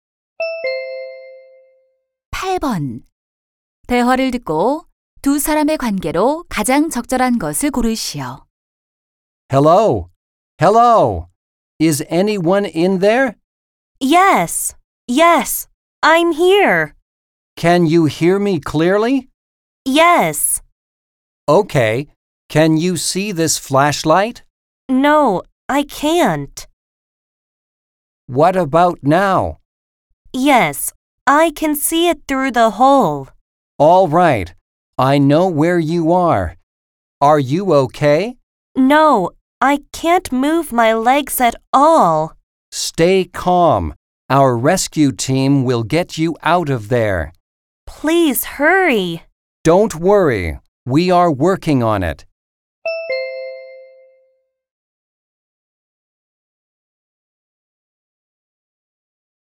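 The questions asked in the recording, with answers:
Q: 대화를 듣고 두 사람의 관계로 가장 적절한 것을 고르시오.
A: 구조대원 - 조난자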